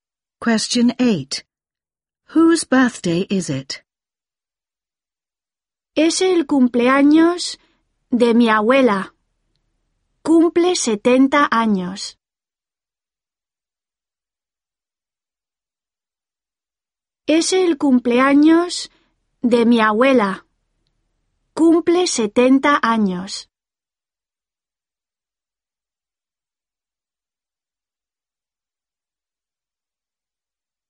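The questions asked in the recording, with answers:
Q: Whose birthday is it?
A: Her grandmother's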